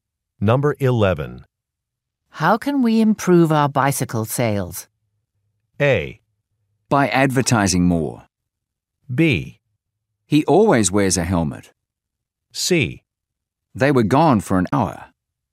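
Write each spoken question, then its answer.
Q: How can we improve our bicycle sales?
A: A: By advertising more.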